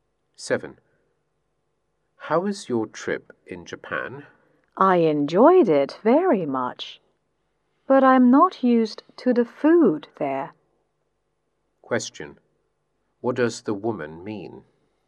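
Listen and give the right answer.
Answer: She enjoyed the trip but wasn't used to the Japanese food.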